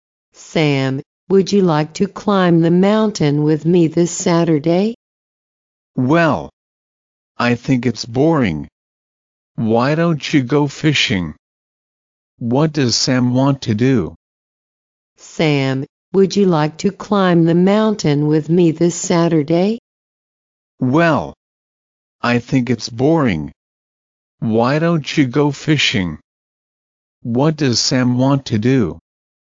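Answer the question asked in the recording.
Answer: Go fishing.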